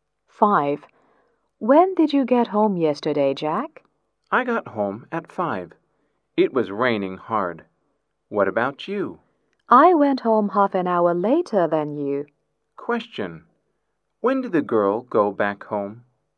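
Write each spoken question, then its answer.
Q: Question, when did the girl go back home?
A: At half past five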